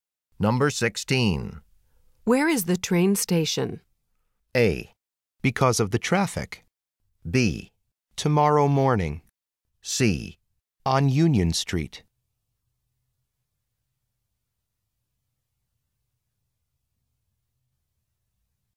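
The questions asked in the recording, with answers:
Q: Where is the train station?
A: C: On Union Street.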